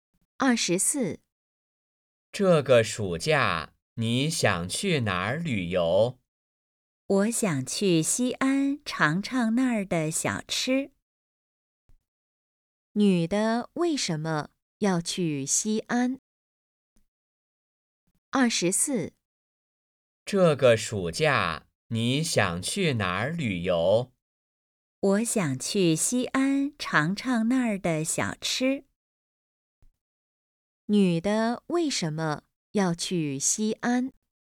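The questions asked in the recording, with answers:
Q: 女的为什么要去西安?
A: 想尝尝那儿的小吃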